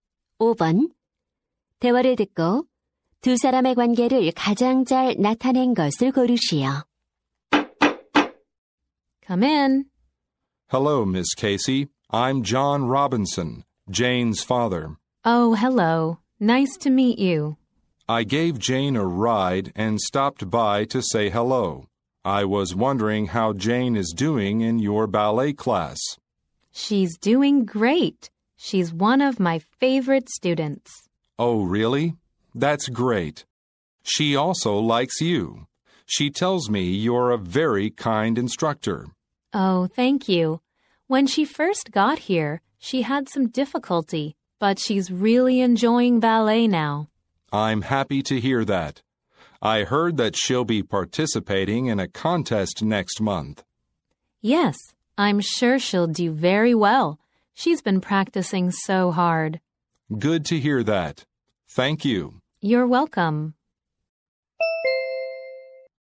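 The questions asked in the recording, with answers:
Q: 대화를 듣고 두 사람의 관계를 가장 잘 나타낸 것을 고르시오.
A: 학부모 - 발레 강사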